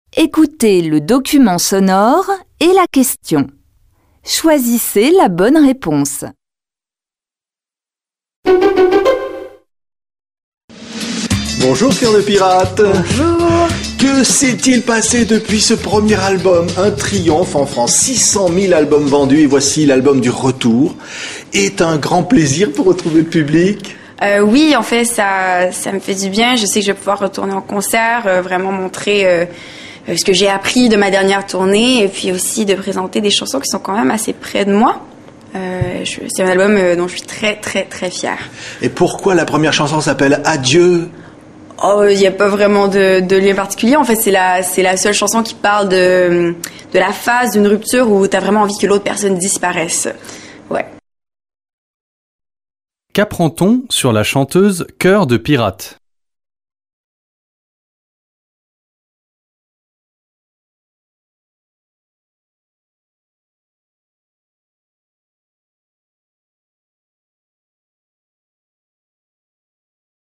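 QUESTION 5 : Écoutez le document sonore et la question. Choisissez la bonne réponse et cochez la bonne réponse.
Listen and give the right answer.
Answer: Après le triomphe de son premier album, elle sort un nouvel album dont elle est très fière.

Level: Tăng dần từ trình độ A1 đến C1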